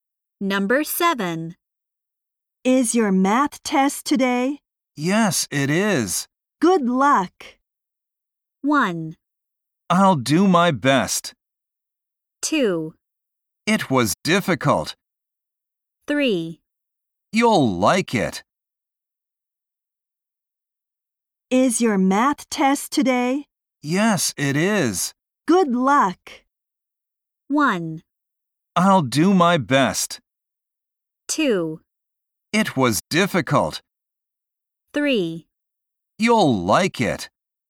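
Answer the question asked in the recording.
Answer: 1: I'll do my best.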